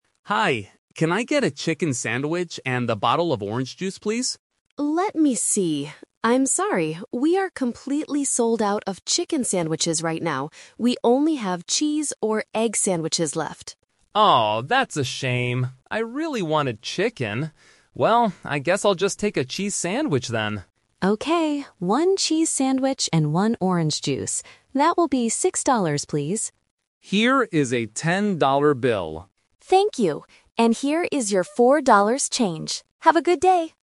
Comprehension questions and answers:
Listen to a student and a staff member in the school cafeteria. Select the best option (A, B, or C) for each of the following questions.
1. What kind of sandwich does Tom finally buy?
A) A chicken sandwich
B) A cheese sandwich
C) An egg sandwich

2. Why didn't Tom get a chicken sandwich?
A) It was too expensive.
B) He changed his mind.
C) The cafeteria didn't have any left.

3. How much does Tom's food and drink cost in total?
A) $4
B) $6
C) $10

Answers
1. B
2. C
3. B

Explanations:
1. Tom decides at the end, "...I guess I'll just take a cheese sandwich then." Why the traps are wrong: Option (A) is "The Twist Trap". Tom asks for a chicken sandwich at the beginning, but they are sold out. Option (C) is "The Rejected Option". The worker says they have egg sandwiches left, but Tom chooses cheese instead.
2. The worker explicitly says, "...we are completely sold out of chicken sandwiches right now." ("Sold out" means they don't have any left). Why the traps are wrong: Options (A) and (B) are "Plausible Traps". Students often change their minds or find things too expensive, but in this case, Tom still "really wanted chicken," so neither of these is the correct reason.
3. The cafeteria worker tells Tom the total price: "That will be six dollars, please." Why the traps are wrong: Option (A) is a "Number Trap". $4 is the change Tom receives back, not the cost of the food. Option (C) is also a "Number Trap". $10 is the bill Tom hands to the worker to pay, not the total cost.

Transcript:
Tom: Hi. Can I get a chicken sandwich and a bottle of orange juice, please?
Cafeteria Worker: Let me see. I'm sorry, we are completely sold out of chicken sandwiches right now. We only have cheese or egg sandwiches left.
Tom: Oh, that's a shame. I really wanted chicken. Well, I guess I'll just take a cheese sandwich then.
Cafeteria Worker: Okay, one cheese sandwich and one orange juice.

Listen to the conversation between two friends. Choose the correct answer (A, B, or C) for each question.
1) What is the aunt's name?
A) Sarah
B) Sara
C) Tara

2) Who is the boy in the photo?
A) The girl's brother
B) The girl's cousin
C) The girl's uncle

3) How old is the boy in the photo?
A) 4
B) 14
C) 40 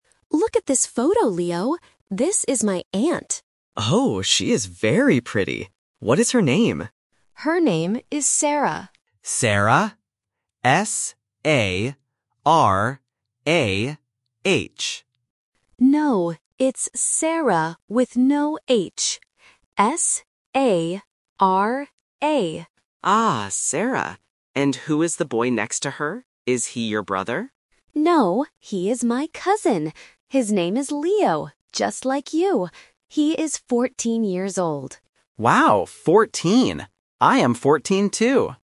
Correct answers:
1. B
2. B
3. B

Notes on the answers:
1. The boy asks if her name is spelled S-A-R-A-H (Option A is the trap). The girl says "No, it's Sara with no 'H'. S-A-R-A." Option C (Tara) sounds similar but is never mentioned.
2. The boy asks "Is he your brother?" (Option A is the trap). The girl answers "No, he is my cousin." Option C (uncle) is a family word but is incorrect for the boy.
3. The girl clearly states, "He is 14 years old." The boy repeats this information: "Wow, 14!" Option C (40) is a trap because "fourteen" and "forty" sound similar. Option A (4) is just a plausible number.

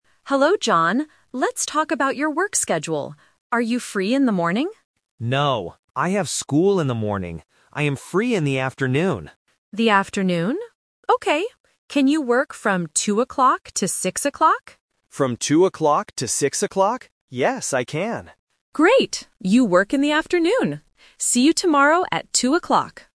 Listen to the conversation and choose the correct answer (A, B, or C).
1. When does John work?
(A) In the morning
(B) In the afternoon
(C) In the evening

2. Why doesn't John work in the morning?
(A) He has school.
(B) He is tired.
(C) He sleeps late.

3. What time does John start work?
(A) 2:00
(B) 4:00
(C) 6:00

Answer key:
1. B
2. A
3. A

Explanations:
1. The Key: John says, "I am free in the afternoon," and the manager confirms, "You work in the afternoon." The Trap (A): "In the morning" is mentioned, but John explicitly says "No" to the morning shift. (C) is a plausible time of day to work, but it is not mentioned.
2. The Key: John gives his reason clearly: "I have school in the morning." The Trap (B & C): Being tired or sleeping late are common reasons why people don't want to work early (plausible), but they are not mentioned in the audio.
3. The Key: The manager asks, "Can you work from 2:00 to 6:00?" and then says, "See you tomorrow at 2:00." The Trap (C): 6:00 is mentioned, but it is the time he finishes work, not the time he starts. (B) is a plausible time, but it is not mentioned.

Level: A1

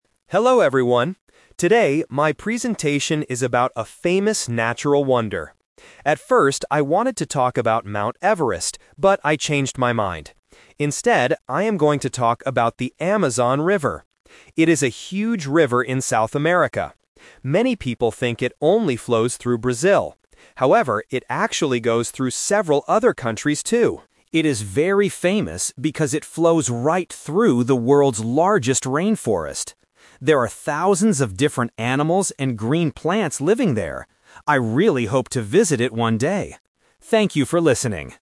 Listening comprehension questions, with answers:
Listen to a student giving a presentation and choose the correct answer (A, B, or C) for each question.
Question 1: What topic did the student originally want to talk about?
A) The Amazon River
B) Mount Everest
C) A large rainforest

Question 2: What is a common mistake people make about the Amazon River?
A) They think it is in South America.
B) They think it has no animals.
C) They think it only flows through Brazil.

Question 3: What is the Amazon River famous for?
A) It flows through the world's largest rainforest.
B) It is located near a very tall mountain.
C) It flows through many big cities.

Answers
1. B
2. C
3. A

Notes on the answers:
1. Why B is correct: The student clearly states his initial plan using the past tense: "At first, I wanted to talk about Mount Everest..." Why A is a trap: The Amazon River is the actual topic of the presentation, but the question asks what he originally wanted to talk about. Why C is wrong: The rainforest is mentioned later as a feature of the Amazon, not as the original topic.
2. Why C is correct: The student points out this specific misconception: "Many people think it only flows through Brazil." Why A is a trap: The river is in South America, which is a true fact stated in the audio, not a mistake or something people just "think." Why B is wrong: The audio explicitly says there are thousands of animals living there.
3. Why A is correct: The script directly answers this: "It is very famous because it flows right through the world's largest rainforest." Why B is a trap: "Mount Everest" (a tall mountain) was mentioned at the beginning of the audio, but it has nothing to do with why the Amazon is famous. Why C is wrong: Big cities are never mentioned in the presentation.

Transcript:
Student: Hello, everyone. Today, my presentation is about a famous natural wonder. At first, I wanted to talk about Mount Everest, but I changed my mind. Instead, I am going to talk about the Amazon River. It is a huge river in South America. Many people think it only flows through Brazil. However, it actually goes through several other countries, too. It is very famous because it flows right through the world's largest rainforest. There are thousands of different animals and green plants living there. I really hope to visit it one day. Thank you for listening.

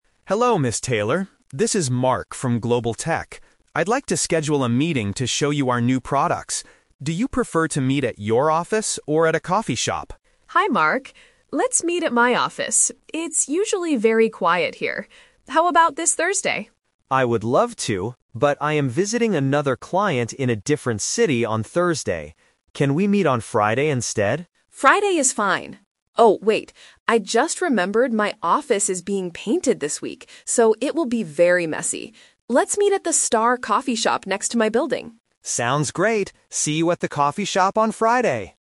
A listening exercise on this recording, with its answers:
Listen to the conversation and choose the correct answer (A, B, or C).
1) Where will Mark and Ms. Taylor meet?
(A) At Mark's office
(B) At Ms. Taylor's office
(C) At a coffee shop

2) Which day will they meet?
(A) Wednesday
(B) Thursday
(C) Friday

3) Why can't they meet on Thursday?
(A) Mark is visiting another client.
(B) Ms. Taylor is out of the city.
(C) Ms. Taylor's office is being painted.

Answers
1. C
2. C
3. A

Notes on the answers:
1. They finally decide to meet at the Star Coffee Shop. Option (B) is a trap because Ms. Taylor suggests her office first, but changes her mind. Option (A) is plausible in a business context but is never mentioned.
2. They agree to meet on Friday at the end of the call. Option (B) is a trap because Thursday is Ms. Taylor's original suggestion, but Mark is busy. Option (A) is not mentioned in the audio.
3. Mark says, "I am visiting another client in a different city on Thursday." Option (B) is a trap because Mark is the one going to a different city, not Ms. Taylor. Option (C) is a trap because the office being painted is the reason they change the location, not the day.

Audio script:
Mark: Hello, Ms. Taylor. This is Mark from Global Tech. I'd like to schedule a meeting to show you our new products. Do you prefer to meet at your office or at a coffee shop?
Ms. Taylor: Hi, Mark. Let's meet at my office. It's usually very quiet here. How about this Thursday?
Mark: I would love to, but I am visiting another client in a different city on Thursday. Can we meet on Friday instead?
Ms. Taylor: Friday is fine. Oh, wait... I just remembered my office is being painted this week, so it will be very messy. Let's meet at the Star Coffee Shop next to my building.

